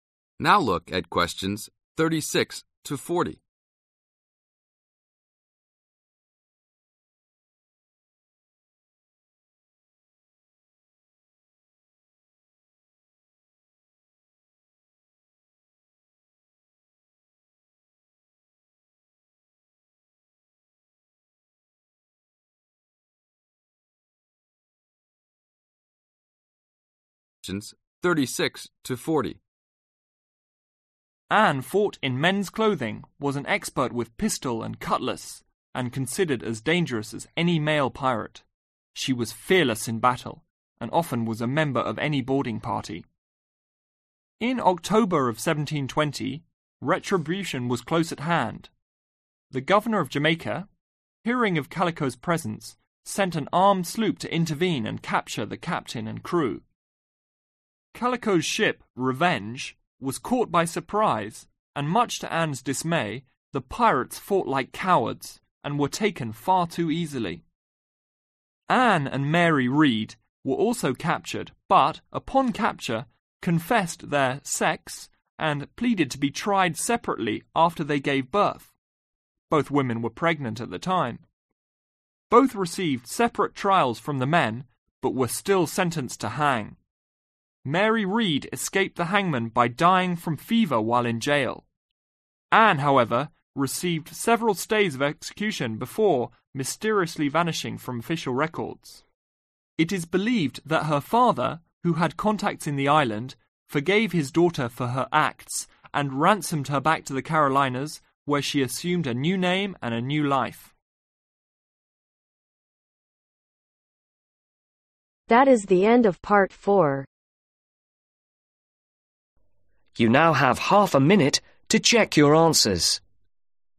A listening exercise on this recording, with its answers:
Write ONE WORD ONLY for each answer.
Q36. Anne was an expert with the (36)............ and cutlass.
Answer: Pistol

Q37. She was often a member of the team that (37)............ ships.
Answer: Boarded

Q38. Was captured surprise and disappointed that her crew fought like (38)............ .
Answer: Cowards

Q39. When captured, they were both (39)............ Marry died in prison.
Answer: Pregnant

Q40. The Read's father paid a (40)............ to free Anne take her back to the Carolina's where she changed her name to live a new life.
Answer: Ransom